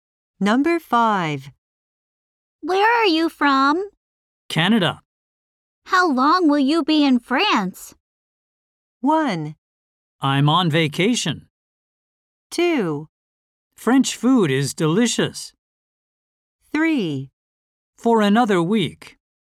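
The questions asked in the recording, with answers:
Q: How long will you be in France?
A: 3: For another week.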